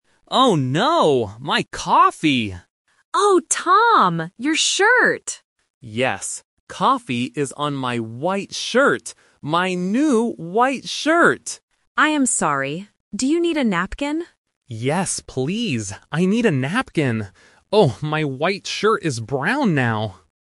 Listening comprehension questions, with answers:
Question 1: What is on the man's shirt?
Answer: Coffee.

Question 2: What color is the man's shirt?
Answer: White.

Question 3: What does the woman give to the man?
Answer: A napkin.

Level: A1